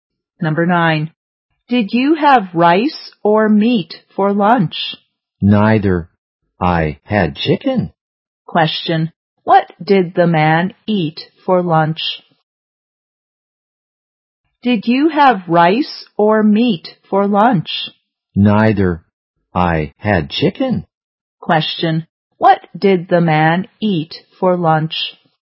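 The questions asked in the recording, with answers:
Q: What did the man eat for lunch?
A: Chicken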